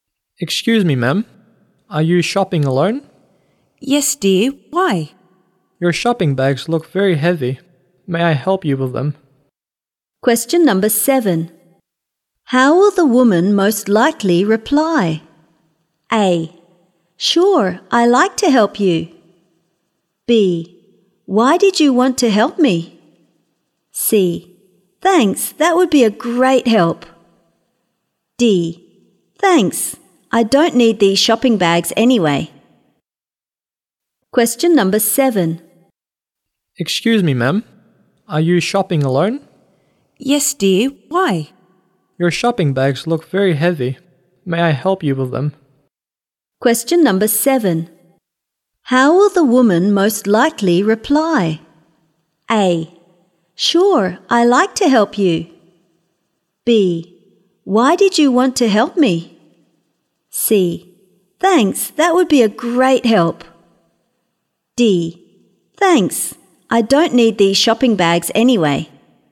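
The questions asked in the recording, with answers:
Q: How will the woman most likely reply?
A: C: Thanks, that would be a great help.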